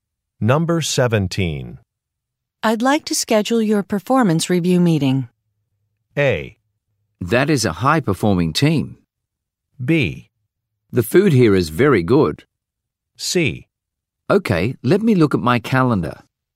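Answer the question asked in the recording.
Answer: C: Okay, let me look at my calendar.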